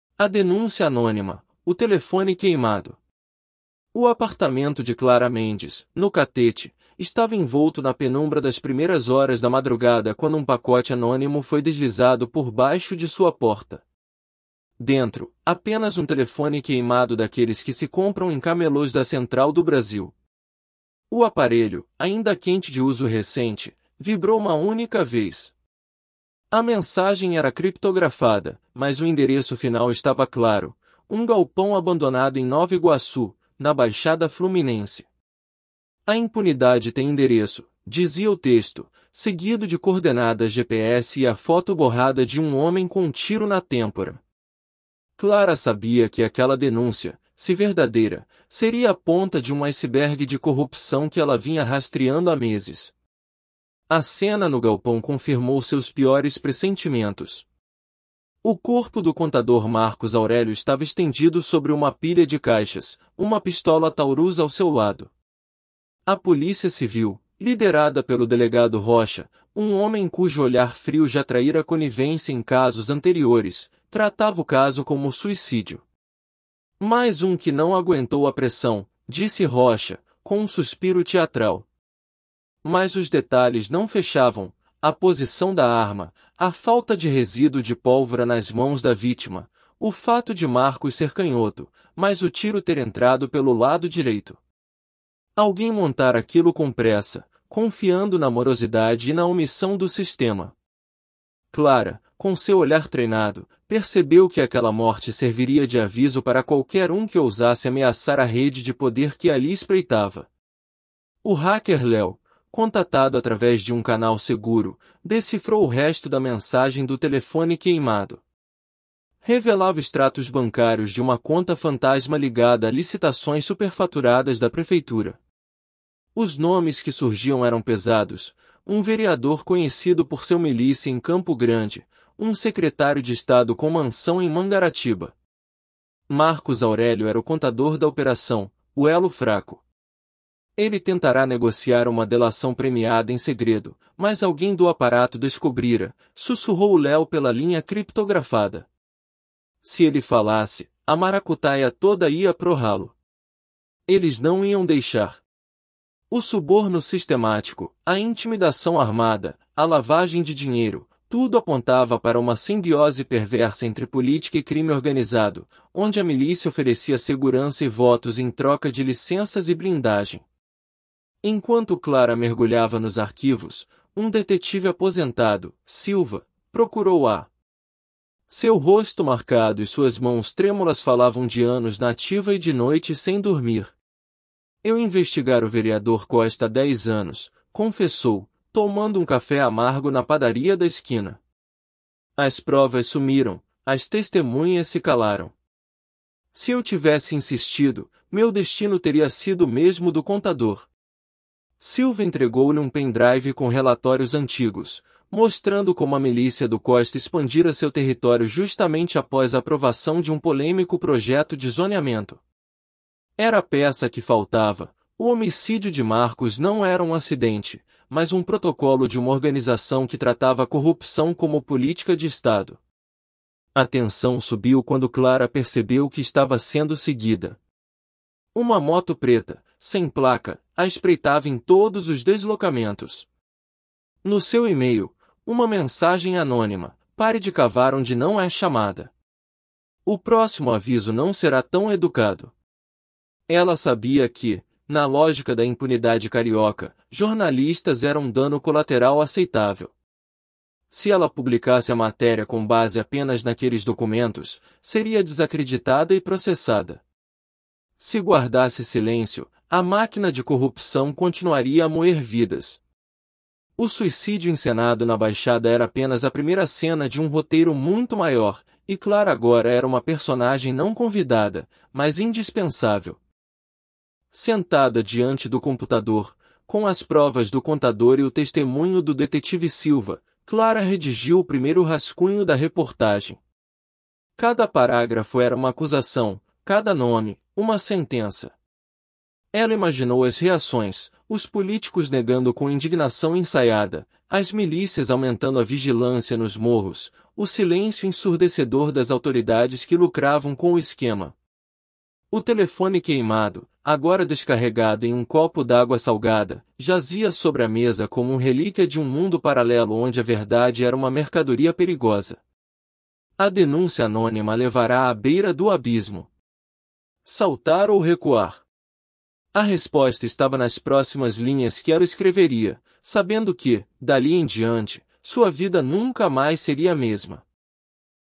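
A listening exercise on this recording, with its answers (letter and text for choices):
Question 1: O que a mensagem criptografada no telefone queimado revelou além do endereço do galpão?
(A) A identidade do assassino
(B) Extratos bancários de uma conta fantasma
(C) O nome do detetive Silva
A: (B) Extratos bancários de uma conta fantasma

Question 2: Qual detalhe no galpão indicava que a morte de Marcos não foi suicídio?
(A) A arma estava longe do corpo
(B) Marcos era canhoto, mas o tiro entrou pelo lado direito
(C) Havia testemunhas no local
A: (B) Marcos era canhoto, mas o tiro entrou pelo lado direito

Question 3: Como o hacker Leo descreveu a tentativa de Marcos Aurélio?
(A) Como uma fuga mal planejada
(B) Como uma negociação de delação premiada em segredo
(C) Como um ato de vingança pessoal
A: (B) Como uma negociação de delação premiada em segredo

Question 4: O que o detetive Silva mostrou nos relatórios antigos sobre o vereador Costa?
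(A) Que ele era inocente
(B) Que a milícia expandiu seu território após um projeto de zoneamento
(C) Que Costa era um aliado de Clara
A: (B) Que a milícia expandiu seu território após um projeto de zoneamento

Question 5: Qual foi a ameaça recebida por Clara quando percebeu que estava sendo seguida?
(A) Uma ligação anônima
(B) Uma mensagem de e-mail anônima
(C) Um bilhete em seu carro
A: (B) Uma mensagem de e-mail anônima

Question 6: O que Clara imaginou como reações à sua reportagem?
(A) Apoio imediato das autoridades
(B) Políticos negando com indignação ensaiada e milícias aumentando vigilância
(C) Uma investigação rápida e transparente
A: (B) Políticos negando com indignação ensaiada e milícias aumentando vigilância

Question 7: O delegado Rocha acreditava genuinamente que Marcos Aurélio cometeu suicídio e investigou todas as inconsistências.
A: Falso

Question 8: A conta fantasma revelada nos extratos bancários estava ligada a licitações superfaturadas da prefeitura.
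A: Verdadeiro

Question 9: O detetive Silva ainda estava na ativa quando procurou Clara para entregar as informações.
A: Falso

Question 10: Clara recebeu uma mensagem anônima de ameaça por e-mail, alertando-a para parar de investigar.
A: Verdadeiro

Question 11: Ao final da história, Clara decidiu não publicar a reportagem para proteger sua própria segurança.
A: Falso

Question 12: Por que o delegado Rocha considerou a morte de Marcos Aurélio um suicídio, apesar das inconsistências?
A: Porque era conivente com a rede de poder e confiava na morosidade e omissão do sistema para encerrar o caso.

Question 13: Qual foi o papel de Marcos Aurélio na rede de corrupção descrita?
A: Era o contador da operação, o elo fraco.

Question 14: Como a milícia e os políticos se beneficiavam mutuamente no esquema?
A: A milícia oferecia segurança e votos em troca de licenças e blindagem.

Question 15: Qual foi a motivação do detetive Silva ao procurar Clara e entregar-lhe o pen drive?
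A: Ele investigara o vereador Costa há dez anos, mas as provas sumiram e as testemunhas se calaram; queria que a verdade viesse à tona.

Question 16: Por que Clara hesitava em publicar a reportagem, mesmo com as provas em mãos?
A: Com base apenas naqueles documentos, seria desacreditada e processada, e estava sendo ameaçada.

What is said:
A Denúncia Anônima: O Telefone Queimado – TEST
A Denúncia Anônima: O Telefone Queimado
O apartamento de Clara Mendes, no Catete, estava envolto na penumbra das primeiras horas da madrugada quando um pacote anônimo foi deslizado por baixo de sua porta. Dentro, apenas um telefone queimado daqueles que se compram em camelôs da Central do Brasil. O aparelho, ainda quente de uso recente, vibrou uma única vez. A mensagem era criptografada, mas o endereço final estava claro: um galpão abandonado em Nova Iguaçu, na Baixada Fluminense. 'A impunidade tem endereço', dizia o texto, seguido de coordenadas GPS e a foto borrada de um homem com um tiro na têmpora. 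Clara sabia que aquela denúncia, se verdadeira, seria a ponta de um iceberg de corrupção que ela vinha rastreando há meses.
A cena no galpão confirmou seus piores pressentimentos. O corpo do contador Marcos Aurélio estava estendido sobre uma pilha de caixas, uma pistola Taurus ao seu lado. A Polícia Civil, liderada pelo delegado Rocha — um homem cujo olhar frio já traíra conivência em casos anteriores —, tratava o caso como suicídio. 'Mais um que não aguentou a pressão', disse Rocha, com um suspiro teatral. Mas os detalhes não fechavam: a posição da arma, a falta de resíduo de pólvora nas mãos da vítima, o fato de Marcos ser canhoto, mas o tiro ter entrado pelo lado direito. Alguém montara aquilo com pressa, confiando na morosidade e na omissão do sistema. Clara, com seu olhar treinado, percebeu que aquela morte serviria de aviso para qualquer um que ousasse ameaçar a rede de poder que ali espreitava.
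O hacker Leo, contatado através de um canal seguro, decifrou o resto da mensagem do telefone queimado. Revelava extratos bancários de uma conta fantasma ligada a licitações superfaturadas da prefeitura. Os nomes que surgiam eram pesados: um vereador conhecido por seu milícia em Campo Grande, um secretário de estado com mansão em Mangaratiba. Marcos Aurélio era o contador da operação, o elo fraco. 'Ele tentara negociar uma delação premiada em segredo, mas alguém do aparato descobrira', sussurrou Leo pela linha criptografada. 'Se ele falasse, a maracutaia toda ia pro ralo. Eles não iam deixar.' O suborno sistemático, a intimidação armada, a lavagem de dinheiro — tudo apontava para uma simbiose perversa entre política e crime organizado, onde a milícia oferecia segurança e votos em troca de licenças e blindagem.
Enquanto Clara mergulhava nos arquivos, um detetive aposentado, Silva, procurou-a. 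Seu rosto marcado e suas mãos trêmulas falavam de anos na ativa e de noites sem dormir. 'Eu investigara o vereador Costa há dez anos', confessou, tomando um café amargo na padaria da esquina. 'As provas sumiram, as testemunhas se calaram. Se eu tivesse insistido, meu destino teria sido o mesmo do contador.' Silva entregou-lhe um pen drive com relatórios antigos, mostrando como a milícia do Costa expandira seu território justamente após a aprovação de um polêmico projeto de zoneamento. Era a peça que faltava: o homicídio de Marcos não era um acidente, mas um protocolo de uma organização que tratava a corrupção como política de estado.
A tensão subiu quando Clara percebeu que estava sendo seguida. Uma moto preta, sem placa, a espreitava em todos os deslocamentos. No seu e-mail, uma mensagem anônima: 'Pare de cavar onde não é chamada. O próximo aviso não será tão educado.' Ela sabia que, na lógica da impunidade carioca, jornalistas eram dano colateral aceitável. 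Se ela publicasse a matéria com base apenas naqueles documentos, seria desacreditada e processada. Se guardasse silêncio, a máquina de corrupção continuaria a moer vidas. O suicídio encenado na Baixada era apenas a primeira cena de um roteiro muito maior, e Clara agora era uma personagem não convidada, mas indispensável.
Sentada diante do computador, com as provas do contador e o testemunho do detetive Silva, Clara redigiu o primeiro rascunho da reportagem. Cada parágrafo era uma acusação, cada nome, uma sentença. Ela imaginou as reações: os políticos negando com indignação ensaiada, as milícias aumentando a vigilância nos morros, o silêncio ensurdecedor das autoridades que lucravam com o esquema. O telefone queimado, agora descarregado em um copo d'água salgada, jazia sobre a mesa como um relíquia de um mundo paralelo onde a verdade era uma mercadoria perigosa. A denúncia anônima a levara à beira do abismo. 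Saltar ou recuar? A resposta estava nas próximas linhas que ela escreveria, sabendo que, dali em diante, sua vida nunca mais seria a mesma.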